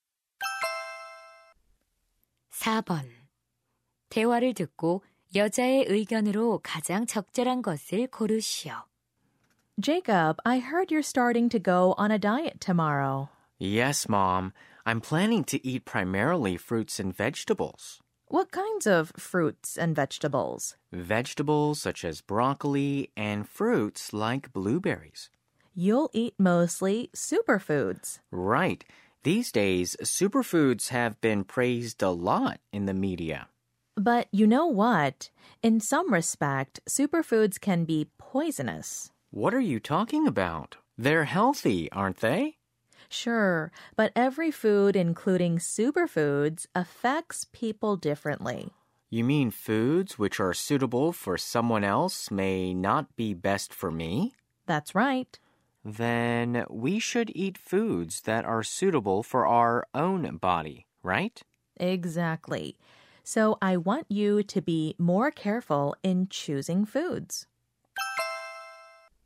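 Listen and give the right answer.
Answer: 자신의 몸에 맞는 음식을 신중하게 골라 먹어야 한다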